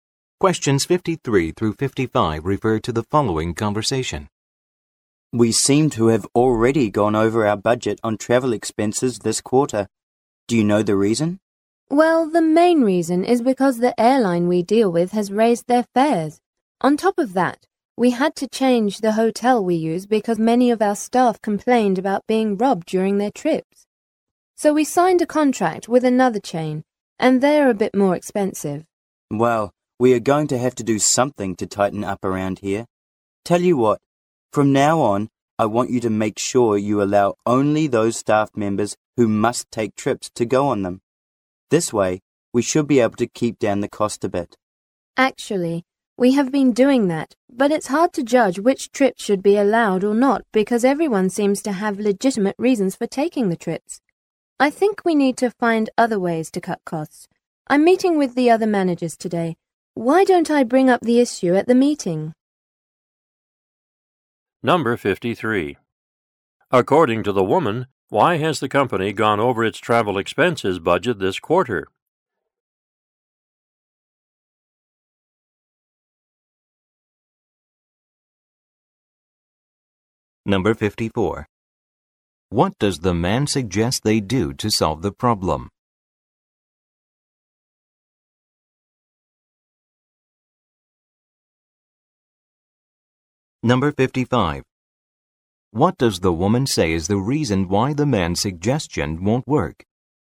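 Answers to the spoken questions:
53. Airline fares rose and the new hotel chain is more expensive
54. Allow only staff who must travel to take trips
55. Everyone seems to have legitimate reasons for trips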